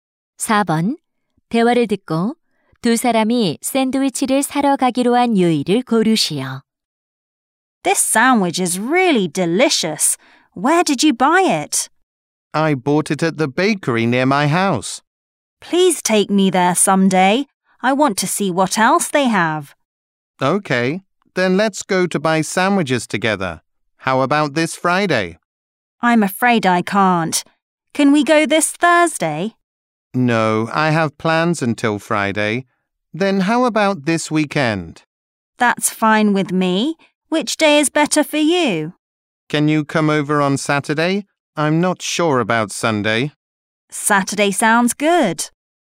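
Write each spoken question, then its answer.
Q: 대화를 듣고 두 사람이 샌드위치를 사러 가기로 한 요일을 고르시오.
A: 토요일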